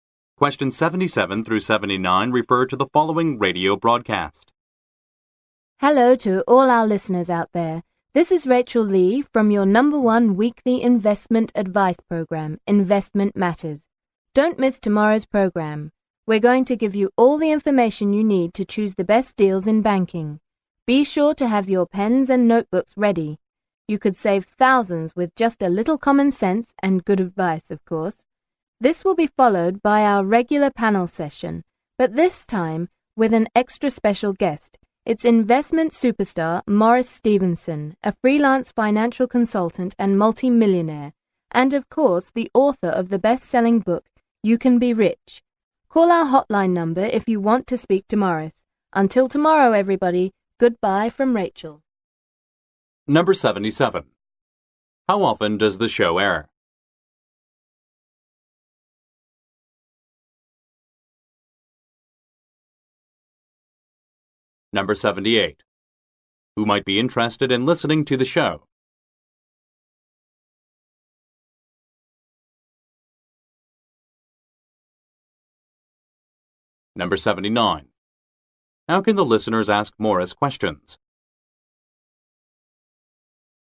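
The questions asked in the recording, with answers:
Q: How often does the show air?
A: Weekly

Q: Who might be interested in listening to the show?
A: People who want investment advice

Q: How can the listeners ask Morris questions?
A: By calling the hotline number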